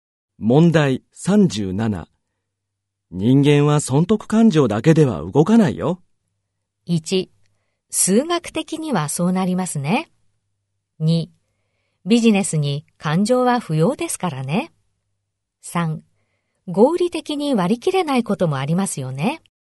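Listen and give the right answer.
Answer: 3: 合理的に割り切れないこともありますよね。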